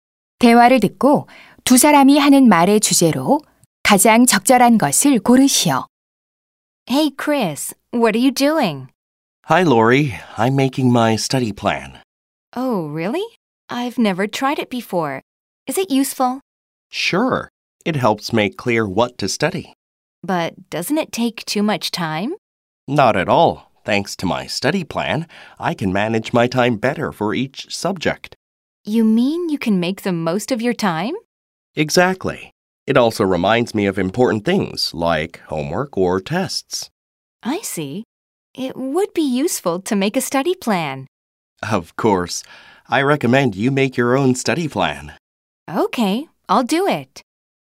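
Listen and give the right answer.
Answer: 학습 계획 세우기의 유용성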